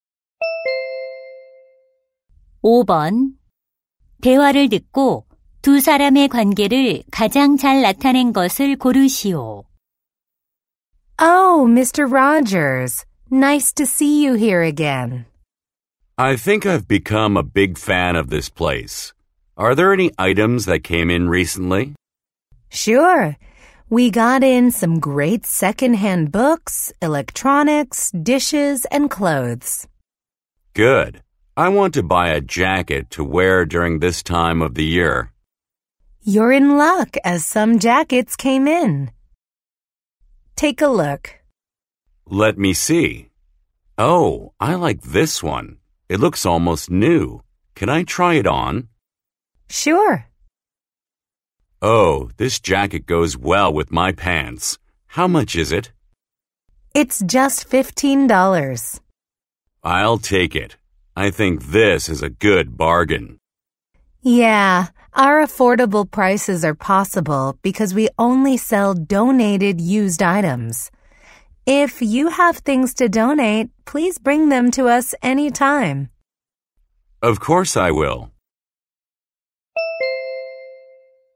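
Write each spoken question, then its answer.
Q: 대화를 듣고 두 사람의 관계를 가장 잘 나타낸 것을 고르시오.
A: 중고 물품 가게 점원 - 손님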